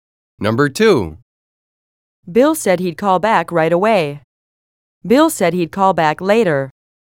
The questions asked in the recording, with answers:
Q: Bill said he'd call back later.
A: Different is the correct answer.